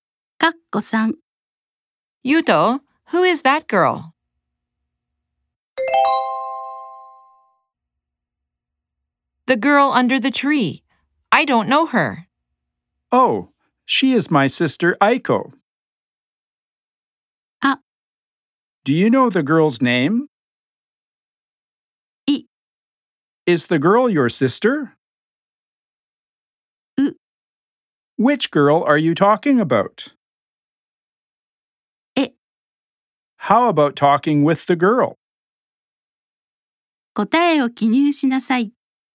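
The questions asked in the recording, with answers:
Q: Yuto, who is that girl?The girl under the tree.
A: C: Which girl are you talking about?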